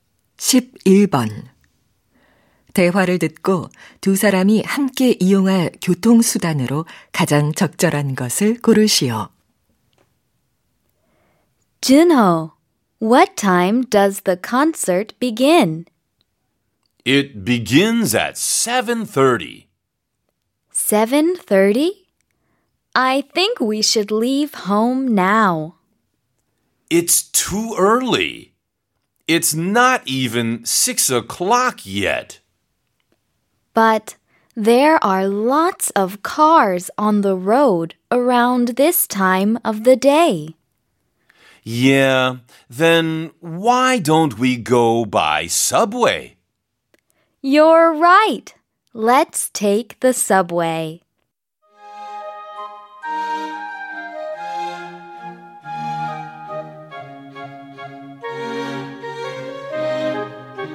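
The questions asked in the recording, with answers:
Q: 대화를 듣고 두 사람이 함께 이용할 교통수단으로 가장 적절한 것을 고르시오.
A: 지하철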